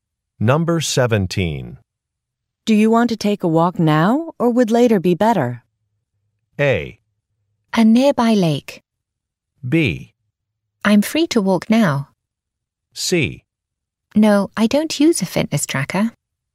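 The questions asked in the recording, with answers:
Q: Do you want to take a walk now or would later be better?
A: B: I'm free to walk now.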